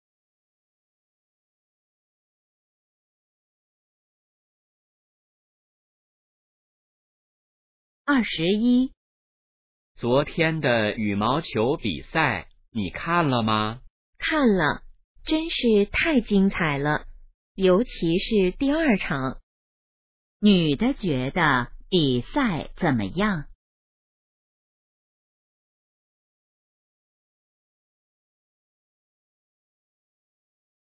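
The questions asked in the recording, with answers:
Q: 女的觉得比赛怎么样?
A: 非常精彩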